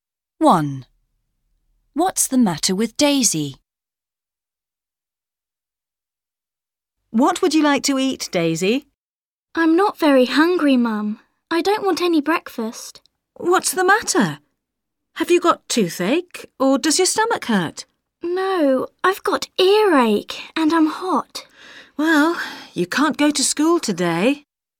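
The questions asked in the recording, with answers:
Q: What's the matter with Daisy?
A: She has earache and she's hot.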